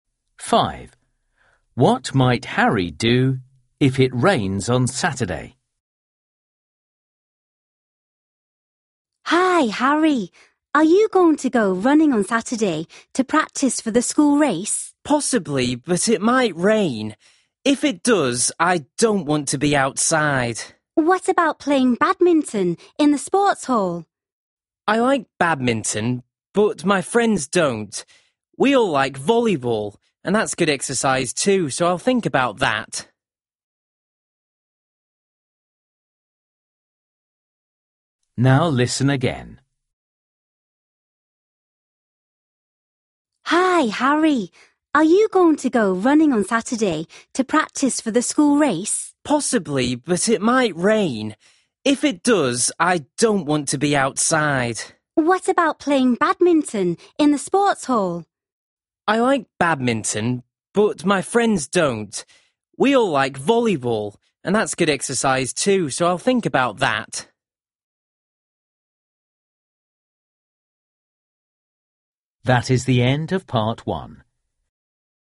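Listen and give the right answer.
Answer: Play volleyball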